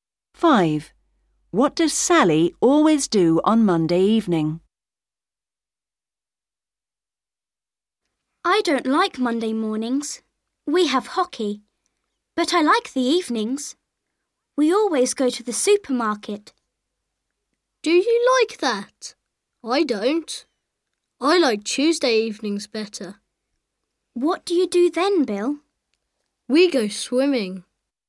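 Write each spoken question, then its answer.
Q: What does Sally always do on Monday evening?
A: goes to the supermarket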